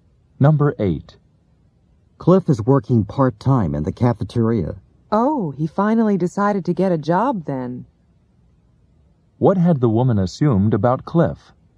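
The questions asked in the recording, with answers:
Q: What had the woman assumed about Cliff?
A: That he didn't want to get a job.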